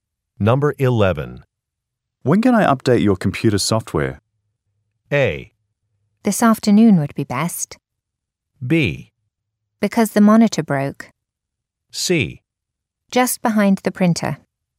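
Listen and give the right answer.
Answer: A: This afternoon would be best.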